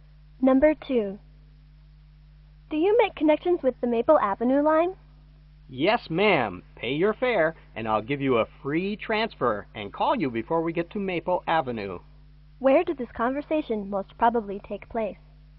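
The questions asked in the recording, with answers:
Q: Where did this conversation most probably take place?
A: On a bus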